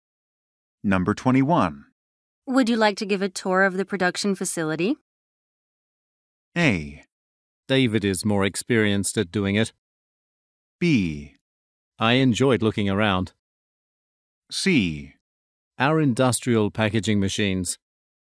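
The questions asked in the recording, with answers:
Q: Would you like to give a tour of the production facility?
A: A: David is more experienced at doing it.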